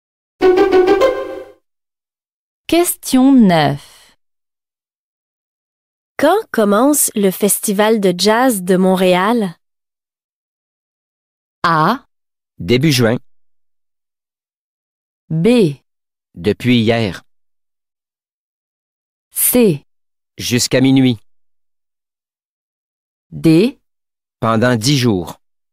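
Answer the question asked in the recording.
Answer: A: Début juin.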